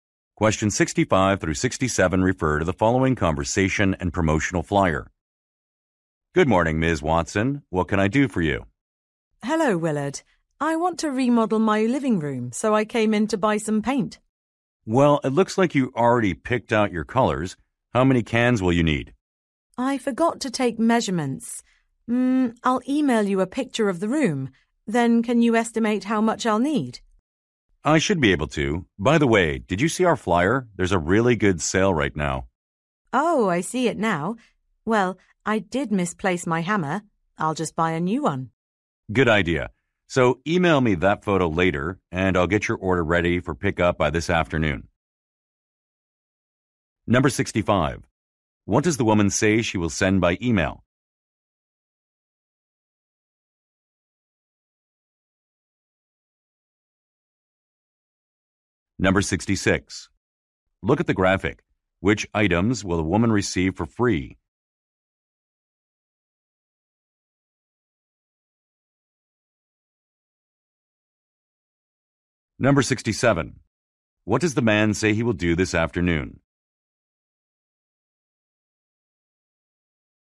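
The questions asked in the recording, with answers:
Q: What does the woman say she will send by email?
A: A picture of the room.

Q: What does the man say he will do this afternoon?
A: Have her order ready for pickup.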